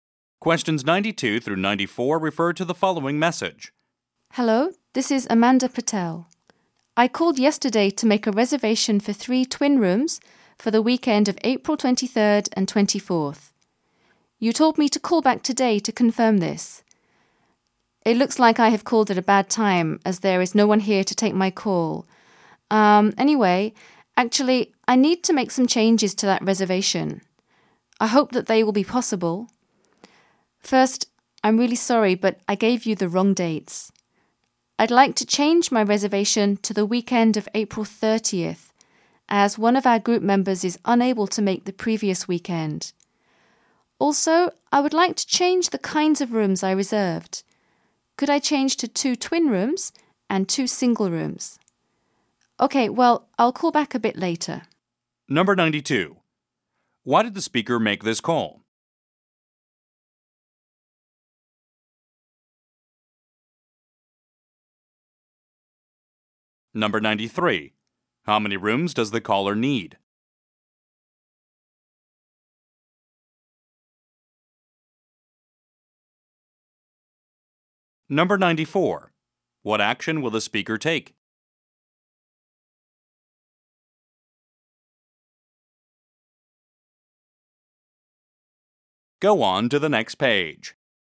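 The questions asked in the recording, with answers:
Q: Why did the speaker make this call?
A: To change her hotel reservation

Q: How many rooms does the caller need?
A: Four

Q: What action will the speaker take?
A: Call back later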